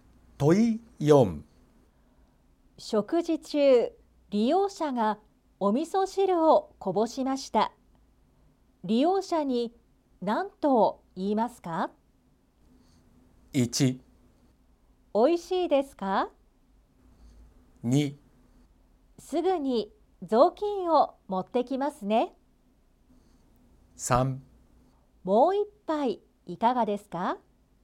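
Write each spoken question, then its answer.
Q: 食事中、利用者がお味噌汁をこぼしました。利用者に何と言いますか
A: 2: すぐに雑巾を持ってきますね。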